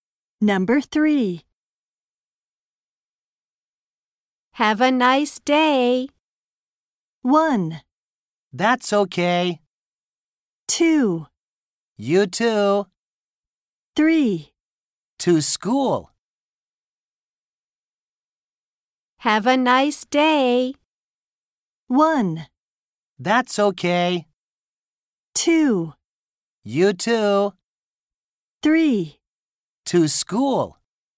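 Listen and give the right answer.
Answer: 2: You too.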